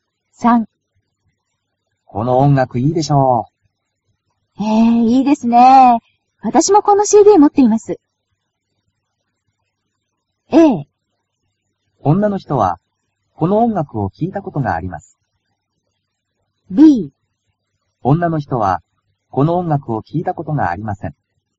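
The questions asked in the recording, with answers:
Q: 女の人は、この音楽を聴いたことがあります。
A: A: 女の人は、この音楽を聴いたことがあります。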